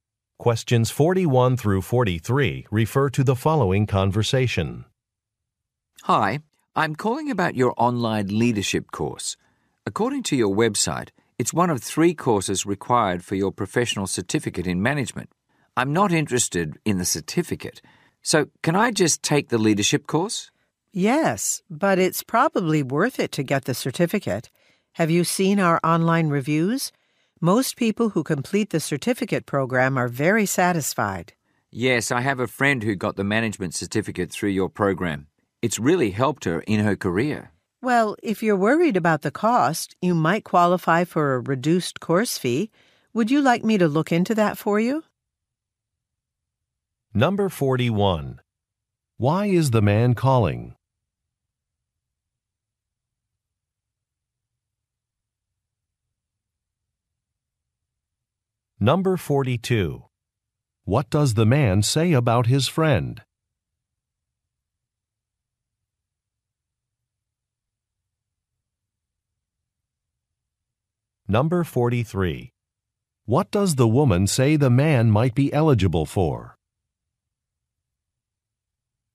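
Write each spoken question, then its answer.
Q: Why is the man calling?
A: To ask about taking only the online leadership course

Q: What does the man say about his friend?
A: The management certificate really helped her career

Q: What does the woman say the man might be eligible for?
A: A reduced course fee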